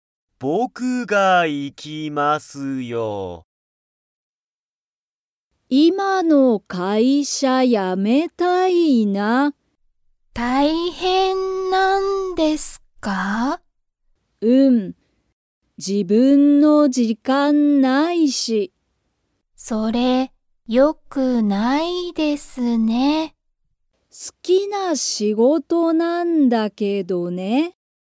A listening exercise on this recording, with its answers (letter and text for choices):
Comprehension Quiz (Skip if you don't understand the conversation yet)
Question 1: ともこは、自分(じぶん)の____がない。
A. 会社(かいしゃ)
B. 時間(じかん)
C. 仕事(しごと)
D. 大学だいがく)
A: B. 時間(じかん)

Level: Level 1